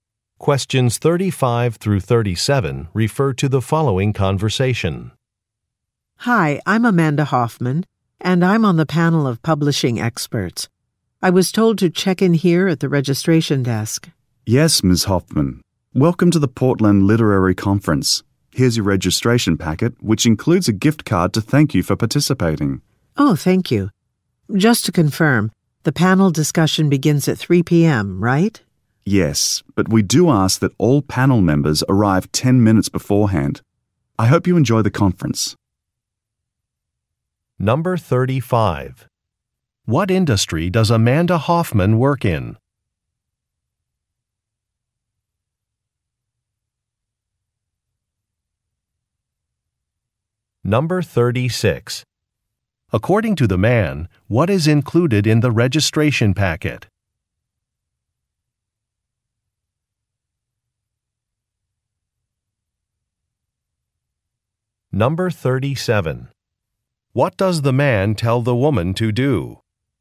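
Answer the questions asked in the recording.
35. Publishing
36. A gift card
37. Arrive 10 minutes before the panel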